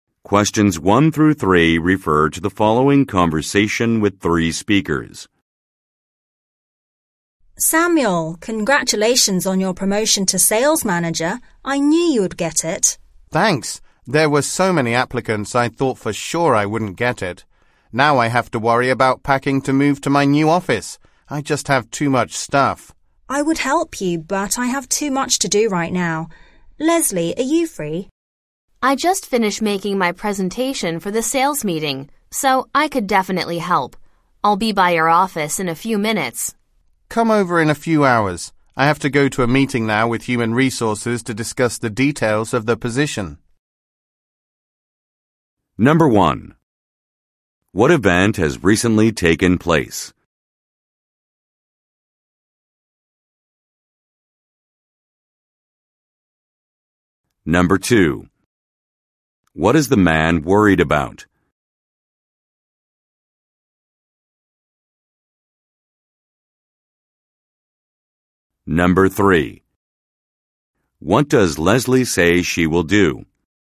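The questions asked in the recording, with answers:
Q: What event has recently taken place?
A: Samuel was promoted to sales manager

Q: What is the man worried about?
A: Packing to move to his new office

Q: What does Leslie say she will do?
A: Help him pack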